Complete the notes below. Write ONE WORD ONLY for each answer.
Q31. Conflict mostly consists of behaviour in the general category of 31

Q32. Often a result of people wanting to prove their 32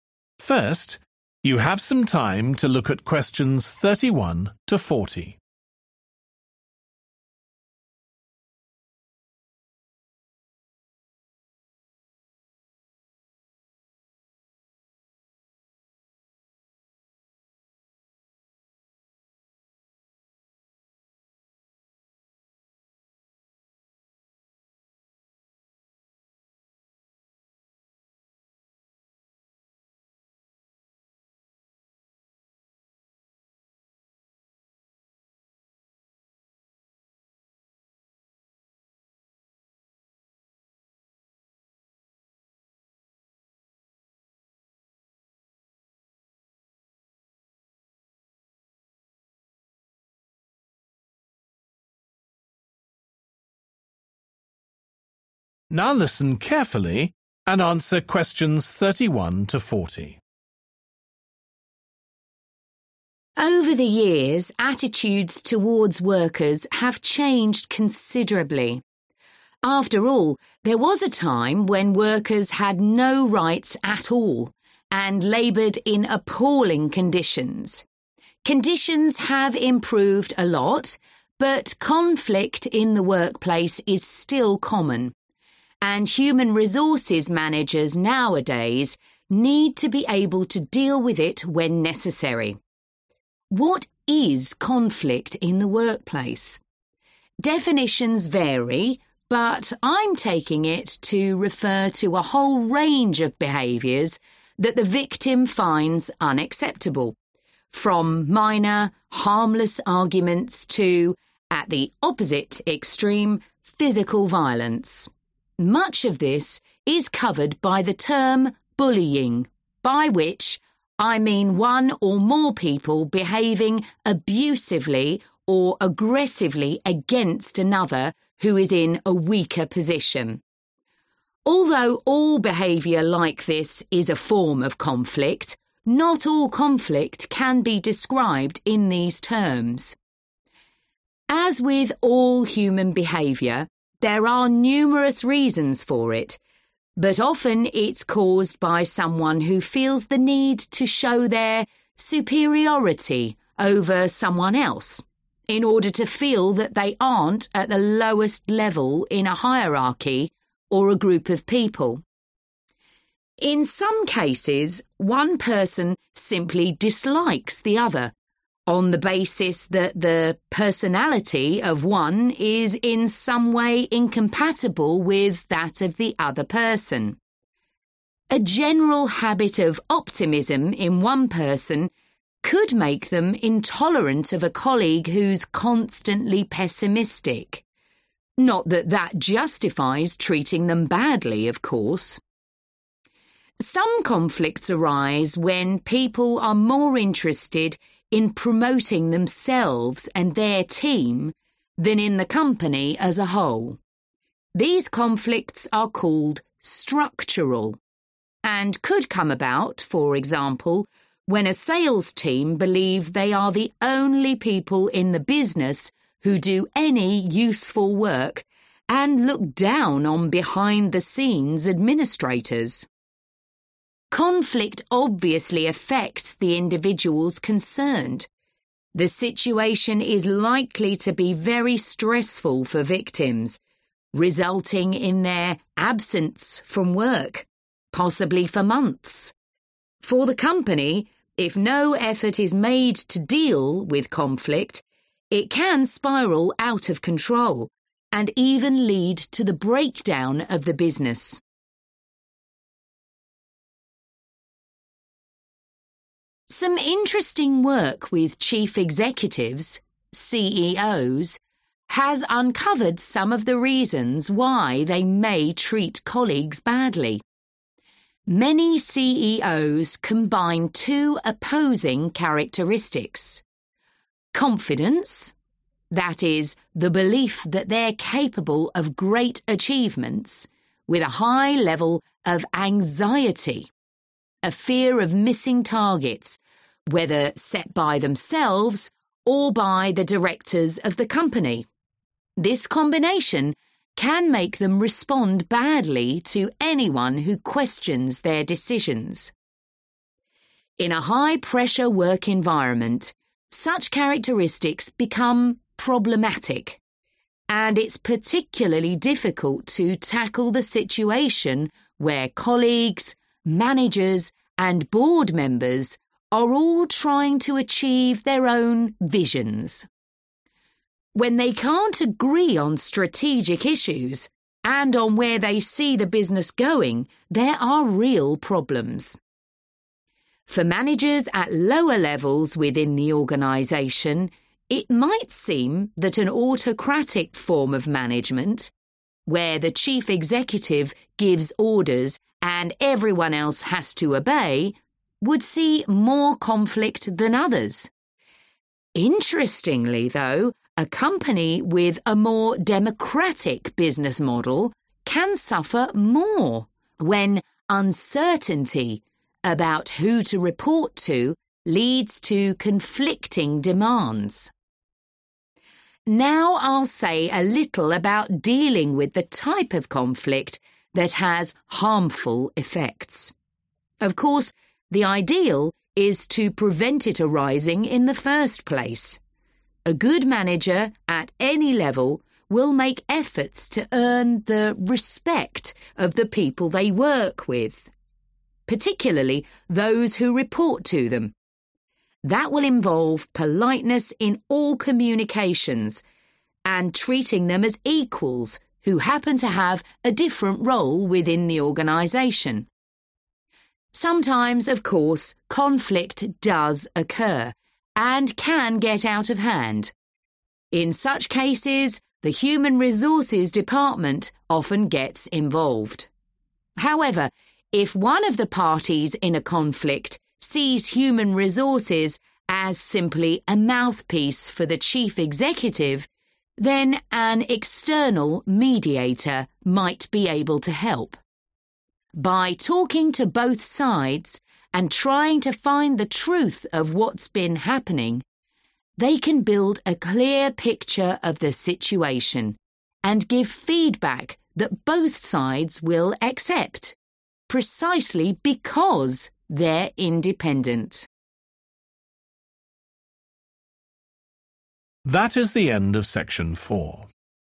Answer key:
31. bullying
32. superiority

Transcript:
Over the years, attitudes towards workers have changed considerably. After all, there was a time when workers had no rights at all, and labored in appalling conditions. Conditions have improved a lot, but conflict in the workplace is still common. And human resources managers nowadays need to be able to deal with it when necessary.
Definitions vary, but I'm taking it to refer to a whole range of behaviors that the victim finds unacceptable, from minor, harmless arguments to – at the opposite extreme – physical violence. Phần lớn điều này được gọi bởi thuật ngữ bắt nạt), by which I mean one or more people behaving abusively or aggressively against another who is in a weaker position. Although all behavior like this is a form of conflict, not all conflict can be described in these terms.
As with all human behavior, there are numerous reasons for it. (Q32) But often it's caused by someone who feels the need to show (=prove) their superiority over someone else (Nhưng thường là do ai đó cảm thấy họ cần phải thể hiện sự nổi bật của mình so với người khác), in order to feel that they aren't at the lowest level in a hierarchy or a group of people.
A general habit of optimism in one person could make them intolerant of a colleague who's constantly pessimistic – not that that justifies treating them badly, of course.
(Q34) Some conflicts arise when people are more interested in promoting themselves and their team than in the company as a whole. Những xung đột này được gọi là 'mang tính cấu trúc'), and could come about, for example, when a sales team believes they are the only people in the business who do any useful work, and look down on behind-the-scenes administrators.
For the company, if no effort is made to deal with conflict, it can spiral out of control, and even lead to the breakdown of the business.
Some interesting work with chief executives – CEOs – has uncovered some of the reasons why they may treat colleagues badly. This combination can make them respond badly to anyone who questions their decisions.
In a high pressure work environment, such characteristics become problematic. (Q37) And it's particularly difficult to tackle the situation where colleagues, managers and board members are all trying to achieve their own (=have different) visions. When they can't agree on strategic issues and on where they see the business going, there are real problems.
For managers at lower levels within the organization, it might seem that an autocratic form of management – where the chief executive gives orders and everyone else has to obey – would see more conflict than others. Interestingly, though, (Q38) a company (=structure) with a more democratic business model, can suffer more, when uncertainty about who to report leads to conflicting demands.
Now I'll say a little about dealing with the type of conflict that has harmful effects. Of course the ideal is to prevent it arising in the first place. That will involve politeness in all communications, and treating them as equals who happen to have a different role within the organization.
Sometimes, of course, conflict does occur, and can get out of hand. In such cases the human resources department often gets involved.
(Q40) However, if one of the parties in a conflict sees human resources as simply a mouthpiece for the chief executive, then an
external(=outside of the company)
mediator
might be able to help
By talking to both sides, and trying to find the truth of what's been happening, they can build a clear picture of the situation, and give feedback that both sides will accept, precisely because they're independent.